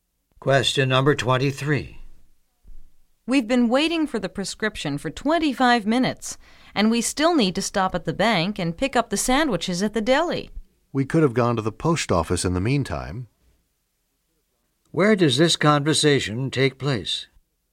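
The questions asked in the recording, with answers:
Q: Where does this conversation take place?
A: At a pharmacy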